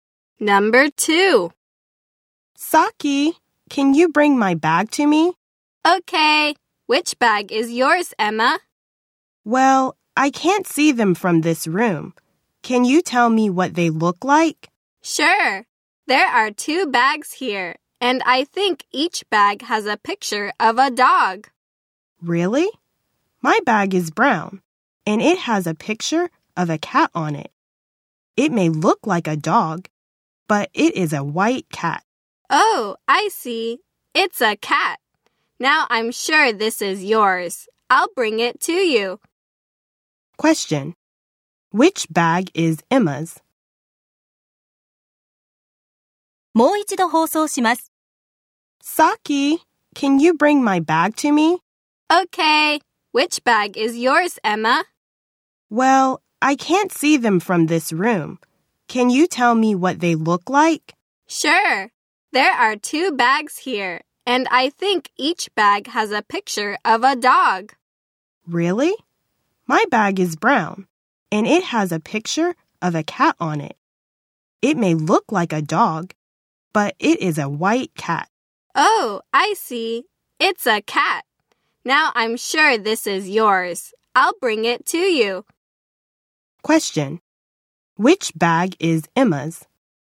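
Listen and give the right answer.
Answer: The brown bag with a picture of a white cat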